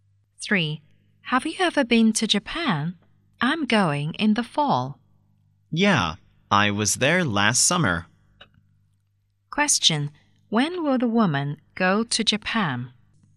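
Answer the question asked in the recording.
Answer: In the fall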